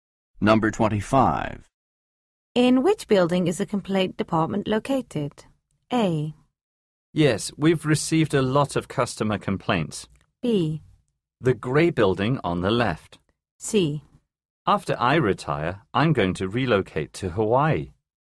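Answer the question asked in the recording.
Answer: B: The grey building on the left.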